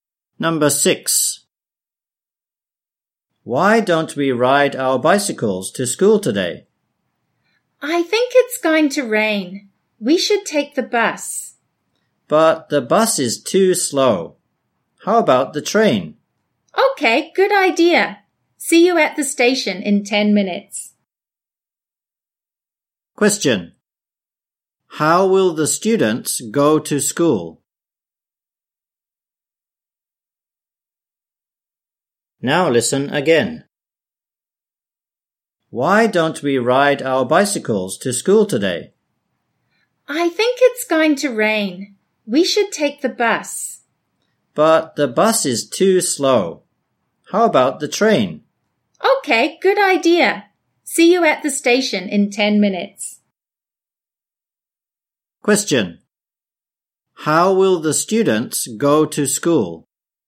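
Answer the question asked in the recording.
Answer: By train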